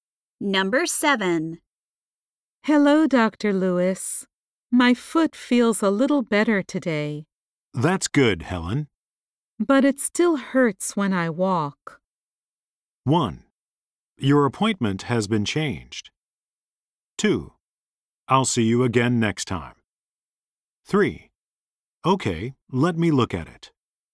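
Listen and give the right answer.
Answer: 3: Okay, let me look at it.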